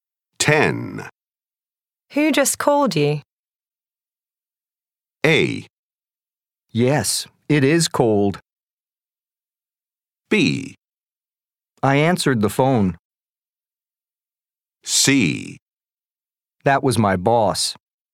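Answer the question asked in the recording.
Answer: C: That was my boss.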